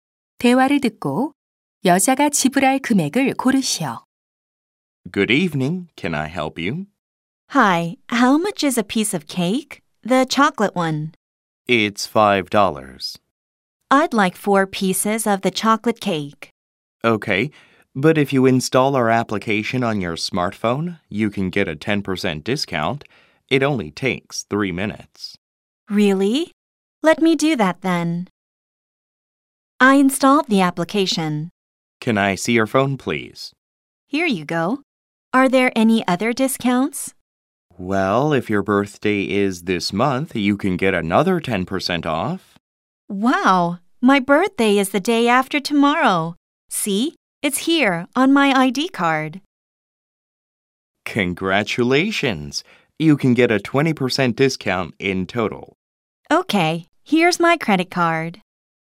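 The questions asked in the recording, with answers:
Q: 대화를 듣고 여자가 지불할 금액을 고르시오.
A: 16달러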